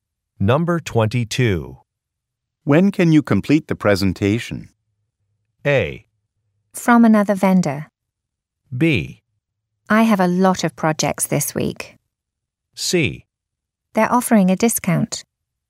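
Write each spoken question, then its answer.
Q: When can you complete the presentation?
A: B: I have a lot of projects this week.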